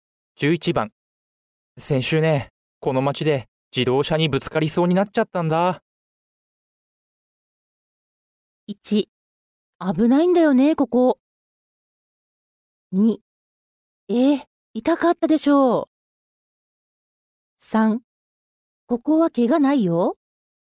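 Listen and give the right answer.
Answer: 1: 危ないんだよね、ここ。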